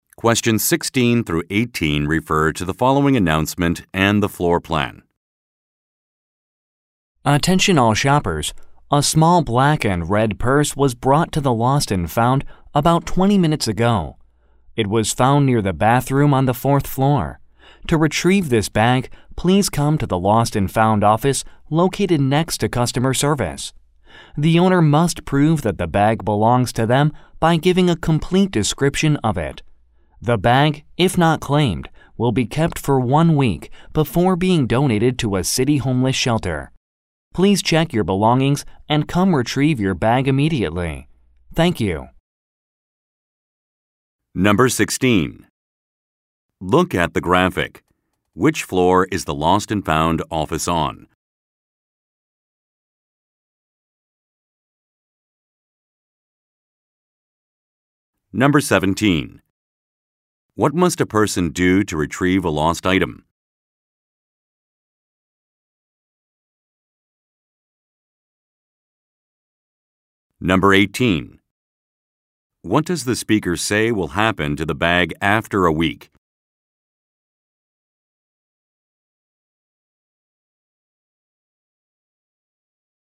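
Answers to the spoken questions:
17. Give a complete description of the item
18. It will be donated to a city homeless shelter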